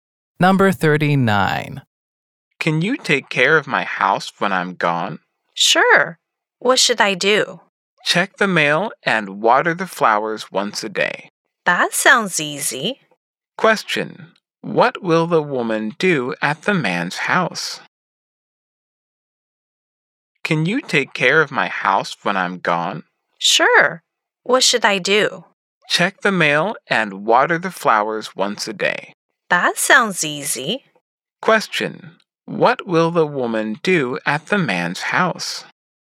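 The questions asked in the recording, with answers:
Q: What will the woman do at the man's house?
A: Check the mail and water the flowers once a day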